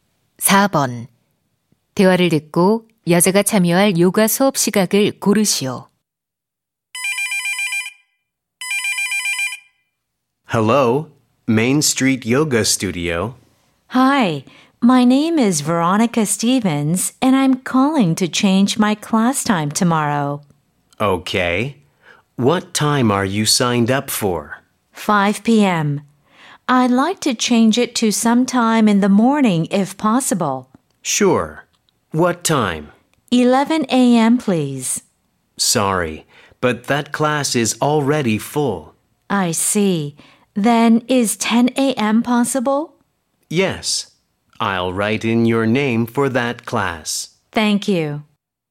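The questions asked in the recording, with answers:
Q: 대화를 듣고 여자가 참여할 요가 수업 시각을 고르시오.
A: 오전 10시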